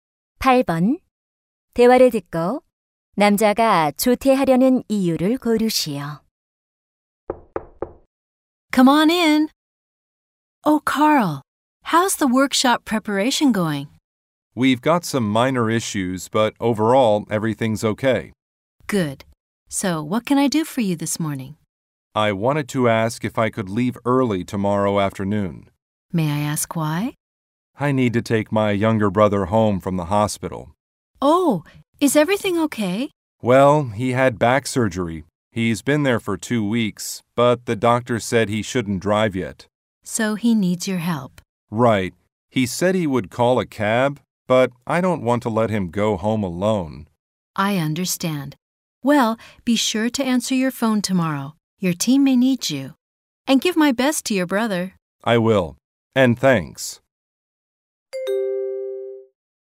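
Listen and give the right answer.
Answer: 남동생을 병원에서 집으로 데려오기 위해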